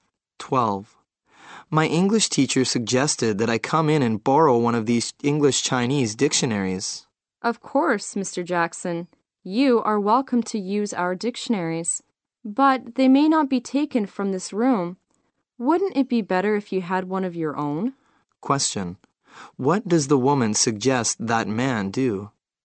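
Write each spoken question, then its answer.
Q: What does the woman suggest that man do?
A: Get his own English-Chinese dictionary.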